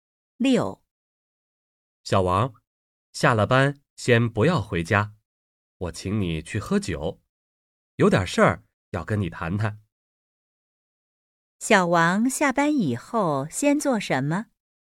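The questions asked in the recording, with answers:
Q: 小王下班以后先做什么?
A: 去喝酒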